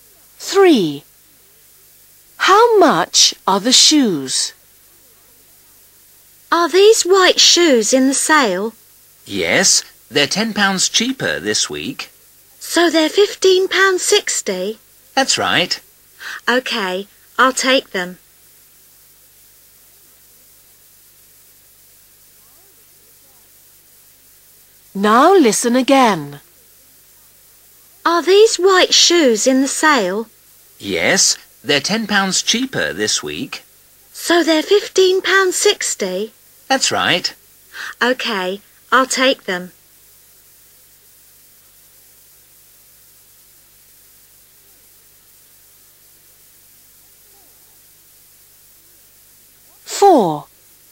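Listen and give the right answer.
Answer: £15.60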